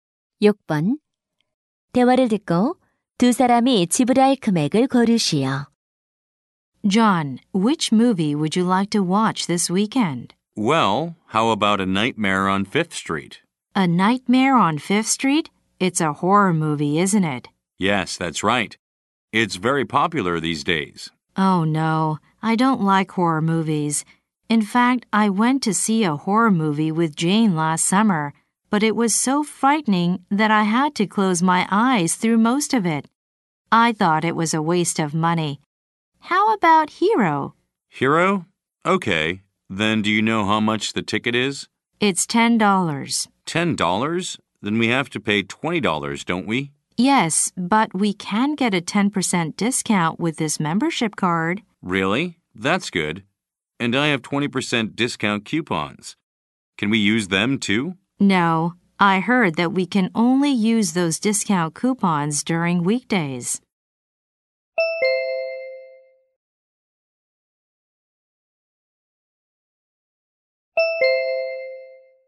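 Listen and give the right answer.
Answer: 18달러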